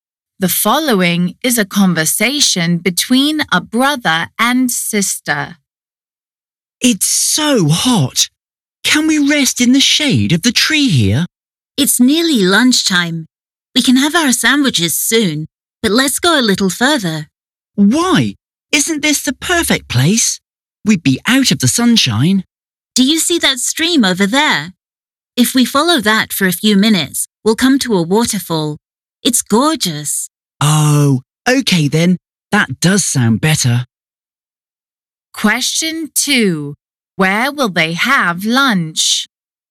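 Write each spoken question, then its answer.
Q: Where will they have lunch?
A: at the waterfall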